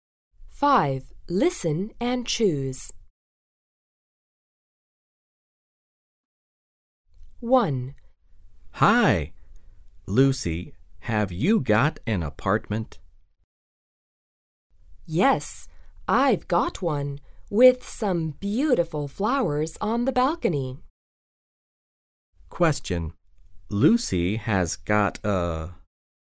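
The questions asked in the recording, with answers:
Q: Lucy has got a...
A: an apartment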